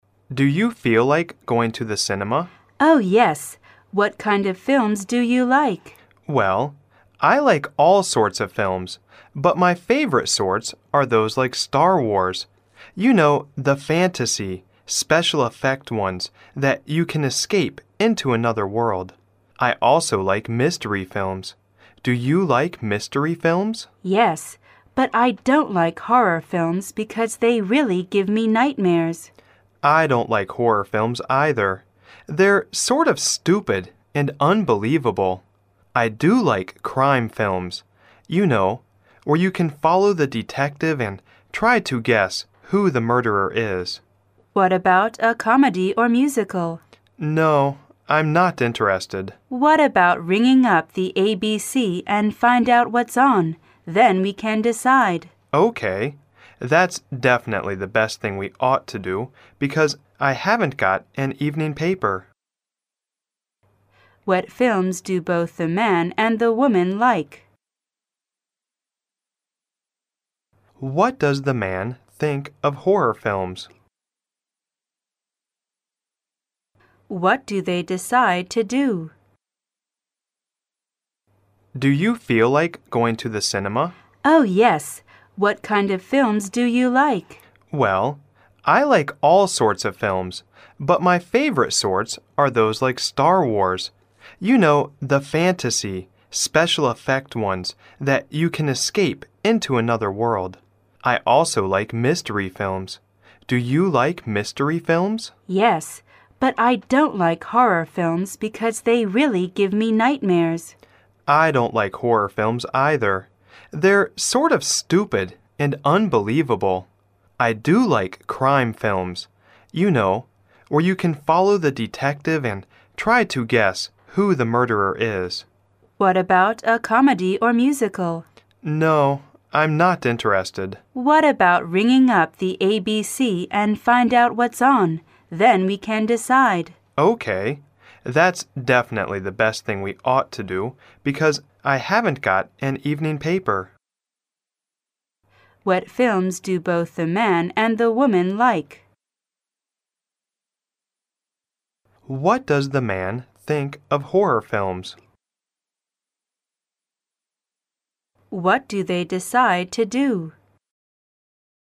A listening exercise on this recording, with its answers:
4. What films do both the man and the woman like?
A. Comedies.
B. Horror films.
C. Mystery films.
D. Crime films.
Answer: Mystery films.

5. What does the man think of horror films?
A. Unreasonable.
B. Horrible.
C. Frightening.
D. Stupid and unbelievable.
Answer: Stupid and unbelievable.

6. What do they decide to do?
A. To ring up the ABC and find out what's on.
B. To watch TV because there is a good musical on.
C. To read an evening paper and find out what's on.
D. To stay at home because there are no good films.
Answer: To ring up the ABC and find out what's on.

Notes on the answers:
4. 当男士表示自己喜欢"mystery films"并问女士是否喜欢时,她的回答是肯定的,故选C。
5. 男士表示"They're(horror films)sort of stupid and unbelievable", sort of带有些轻蔑的语气,故选D。
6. 二人最后达成的一致意见是先给ABC打电话,然后再做决定看什么片,故选A。

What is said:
A B C D C [听力原文] M: Do you feel like going to the cinema? W: Oh, yes. What kind of films do you like? M: Well, I like all sorts of films, but my favorite sorts are those like Star Wars. You know, the fantasy, special effect ones that you can escape into another world. I also like mystery films, do you like mystery films? W: Yes, but I don't like horror films because they really give me nightmares. They're sort of stupid and unbelievable. I do like crime films, you know, where you can follow the detective and try to guess who the murderer is. W: What about a comedy or musical? M: No, I'm not interested. W: What about ringing up the ABC and find out what's on? Then we can decide. That's definitely the best thing we ought to do because I haven't got an evening paper.

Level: 大学英语三级A级

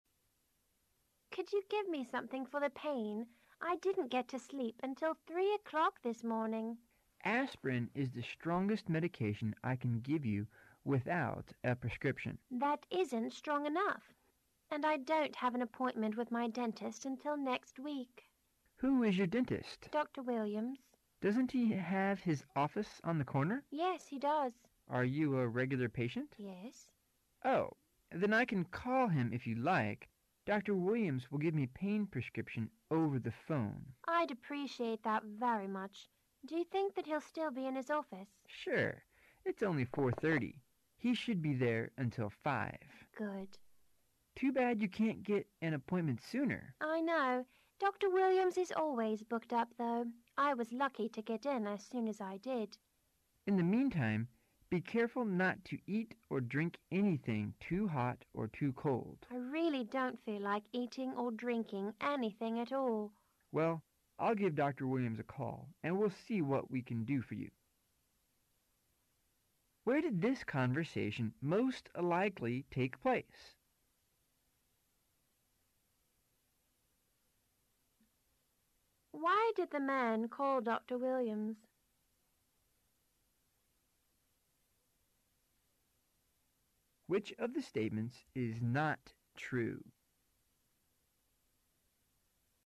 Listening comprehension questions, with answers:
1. Why did the man call Dr. Williams?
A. To tell him that the woman would meet him at his office.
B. To ask him for an appointment.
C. To ask him what time the woman's appointment was.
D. To get a prescription for the woman.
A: To get a prescription for the woman.

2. Which of the statements is NOT true?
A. The woman had a toothache.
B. She wanted to buy some aspirin.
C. She was a regular patient of Dr. Williams.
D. Dr. Williams was very busy.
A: She wanted to buy some aspirin.

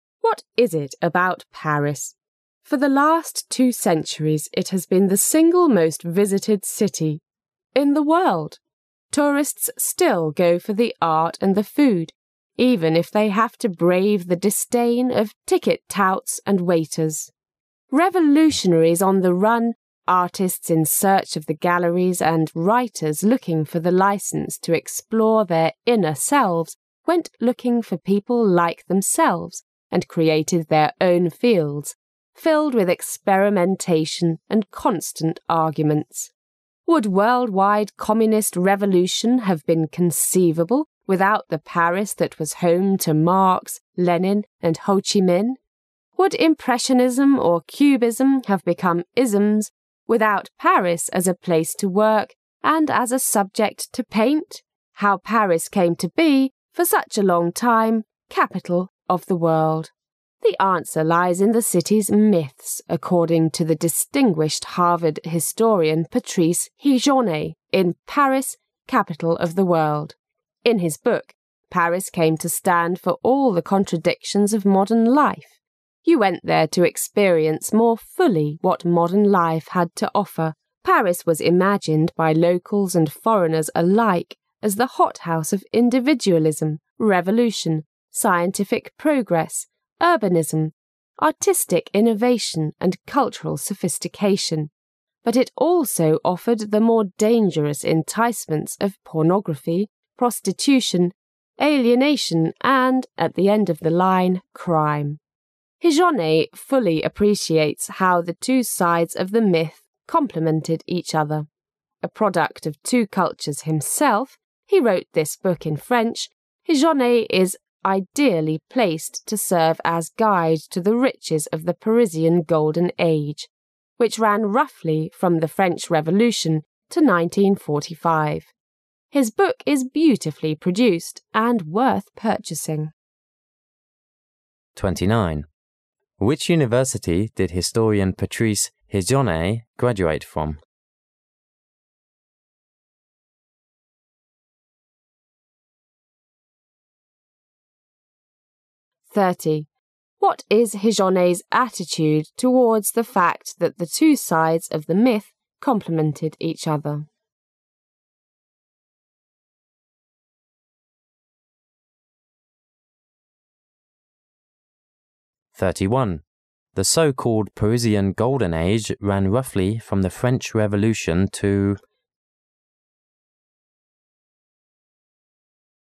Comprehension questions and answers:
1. What is Higonnet's attitude towards the fact that the two sides of the "myth" complemented each other?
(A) Appreciation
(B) Dislike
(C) Indifference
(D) Anger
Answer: Appreciation

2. The so-called Parisian Golden Age ran roughly from the French Revolution to.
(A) 1925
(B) 1935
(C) 1945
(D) 1955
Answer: 1945

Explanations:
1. 问题是"对于'神话'两方面互补的事实,Patrice Higonnet是何种态度?"正确答案是"欣赏",其依据是"Higonnet fully appreciates how the two sides of the 'myth' complemented each other."另外,这一类涉及态度的问题,也可以综合全文,做出正确的判断。
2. 问题是"所谓的法国黄金时代大致从法国革命到哪一年?"正确答案是"1945",其依据是"... the Parisian Golden Age,which ran roughly from the French Revolution t0 1945."这里有一个关键句型:run from...to...意为:从...到...。

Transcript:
For the last two centuries it has been the single most visited city in the world. Tourists still go for the art and the food, even if they have to brave the disdain of ticket-takers and waiters. Revolutionaries on the run, artists in search of the galleries and writers looking for the Ii cense to explore their inner selves went looking for people like themselves and created their own fields filled with experimentation and constant arguments. Would worldwide communist revolution have been conceivable without the Paris that was home to Marx, Lenin and Ho Chi Minh? Would Impressionism or Cubism have become "isms" without Paris as a place to work and as a subject to paint? How Paris came to be, for such a long time, "capital of the world"? The answer lies in the city's "myths,' according to the distinguished Harvard historian Patrice Higonnet in "Paris: Capital of the World. ' In his book, Paris came to stand for all the contradictions of modern life; you went there to experience more fully what modern life had to offer. Paris was imagined, by locals and foreigners alike, as the hothouse of individualism, revolution, scientific progress, urbanism, artistic innovation and cultural sophistication, but it also offered the more dangerous enticements of pornography, prostitution, alienation and, at the end of the line, crime. Higonnet fully appreciates how the two sides of the "myth" complemented each other. A product of two cultures himself--he wrote this book in French—Higonnet is ideally placed to serve as guide to the riches of the Parisian Golden Age, which ran roughly from the French Revolution to 1945. His book is beautifully produced and worth purchasing. Which university did historian Patrice Higonnet graduate from?

